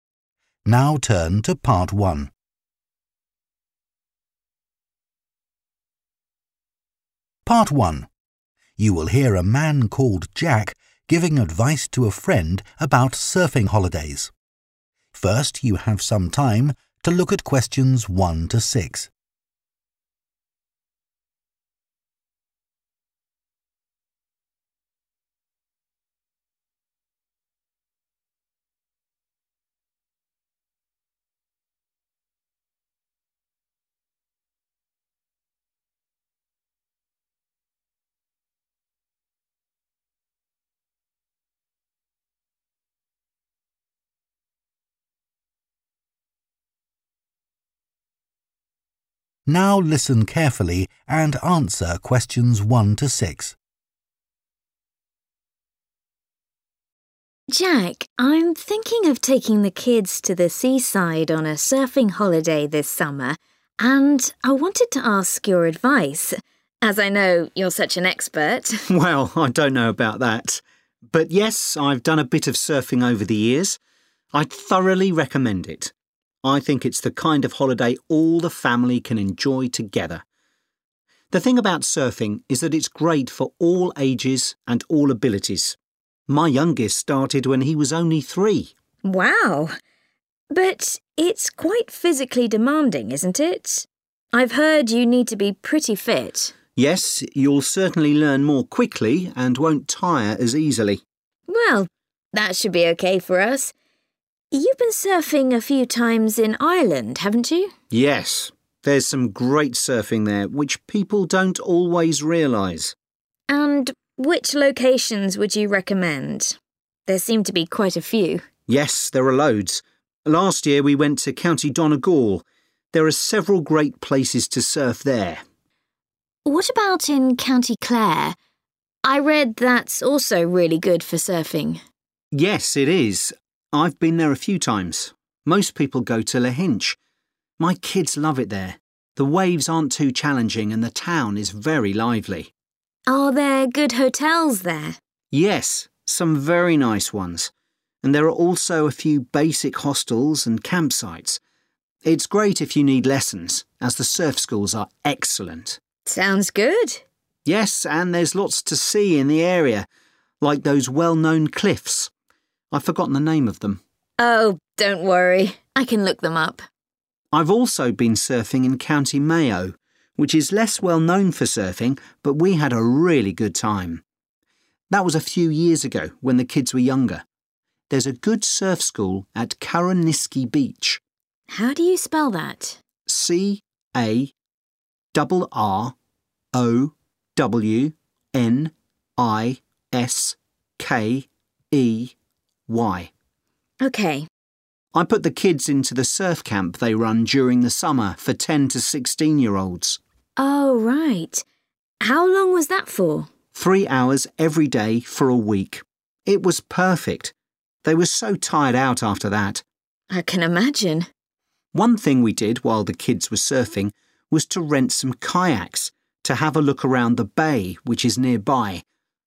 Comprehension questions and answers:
Complete the notes below. Write ONE WORD AND/OR A NUMBER for each answer.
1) Recommends surfing for 1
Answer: family

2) Need to be quite 2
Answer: fit

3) Lahinch has some good quality 3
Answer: hotels

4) Good surf school at 4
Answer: Carrowniskey

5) Surf camp lasts for one 5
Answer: week

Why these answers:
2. I've heard you need to be pretty [=quite] fit [Tôi nghe nói bạn cần phải khá khỏe khoắn]
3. Are there good hotels there [Có khách sạn tốt ở đó không]
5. Three hours every day for a week [Ba giờ mỗi ngày trong vòng một tuần]

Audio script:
WOMAN: Jack, I'm thinking of taking the kids to the seaside on a surfing holiday this summer and I wanted to ask your advice – as I know you're such an expert.
JACK: Well, I don't know about that, but yes, I've done a bit of surfing over the years. I'd thoroughly recommend it. The thing about surfing is that it's great for all ages and all abilities. My youngest started when he was only three!
WOMAN: Wow! But it's quite physically demanding, isn't it?
JACK: Yes. You'll certainly learn more quickly and won't tire as easily.
WOMAN: Well – that should be OK for us. You've been surfing a few times in Ireland, haven't you?
JACK: Yes. There's some great surfing there, which people don't always realise.
WOMAN: And which locations would you recommend? – there seem to be quite a few.
JACK: Yes, there are loads. Last year we went to County Donegal. There are several great places to surf there.
WOMAN: What about in County Clare? I read that's also really good for surfing.
JACK: Yes, it is. I've been there a few times. Most people go to Lahinch. My kids love it there. The waves aren't too challenging and the town is very lively.
JACK: Yes – some very nice ones and there are also a few basic hostels and campsites.
WOMAN: Sounds good.
JACK: Yes and there's lots to see in the area – like those well-known cliffs – ... I've forgotten the name of them ...
WOMAN: Oh don't worry – I can look them up.
JACK: I've also been surfing in County Mayo, which is less well-known for surfing, but we had a really good time. That was a few years ago when the kids were younger.
WOMAN: How do you spell that?
JACK: C-A-double R-O-W-N-I-S-K-E-Y
WOMAN: OK.
JACK: I put the kids into the surf camp they run during the summer for 10-16 year olds.
WOMAN: Oh right. How long was that for?
It was perfect – they were so tired out after that.
WOMAN: I can imagine.